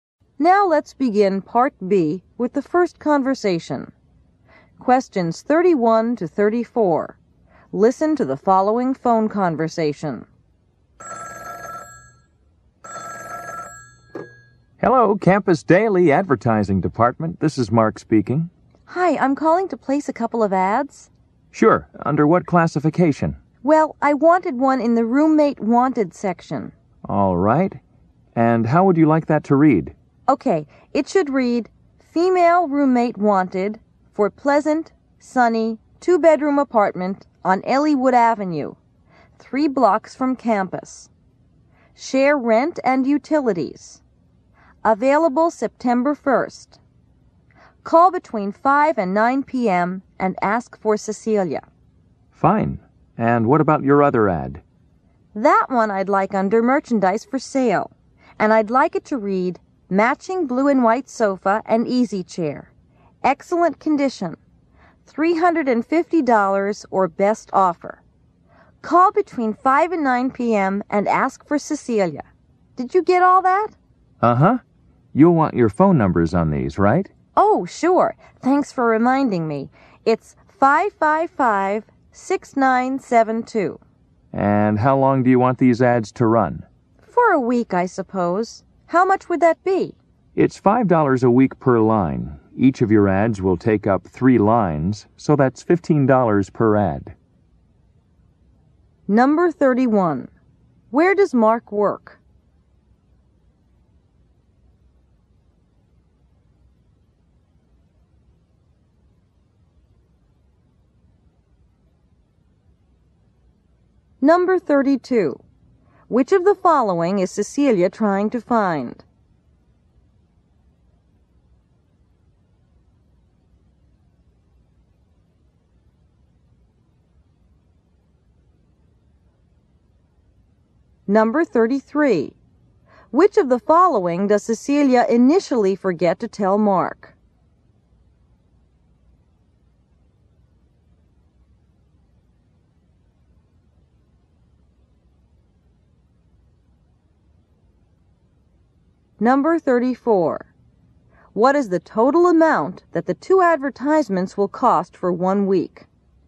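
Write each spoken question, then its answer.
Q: Where does Mark work?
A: At the Campus Daily advertising department

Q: Which of the following is Cecilia trying to find?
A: A female roommate

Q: Which of the following does Cecilia initially forget to tell Mark?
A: Her phone number

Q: What is the total amount that the 2 advertisements will cost for 1 week?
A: $30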